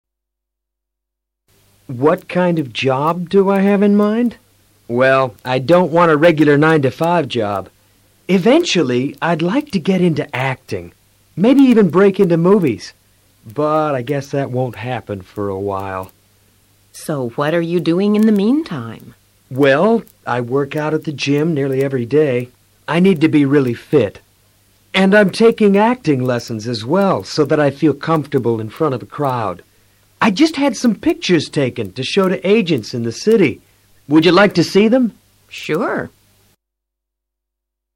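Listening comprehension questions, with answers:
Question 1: What's he interested in?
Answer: Getting in the acting.

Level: Nivel Intermedio a Intermedio Alto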